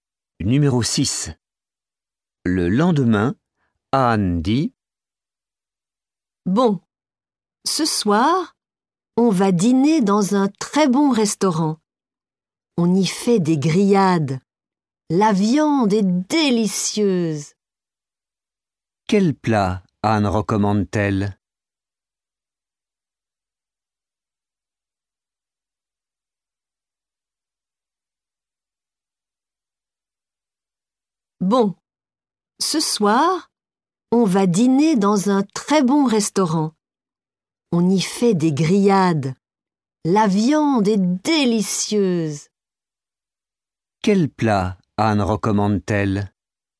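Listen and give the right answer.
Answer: Les grillades (la viande)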